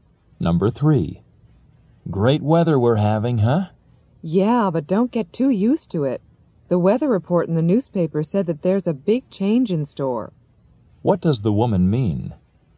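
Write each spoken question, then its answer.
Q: What does the woman mean?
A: The good weather will soon change.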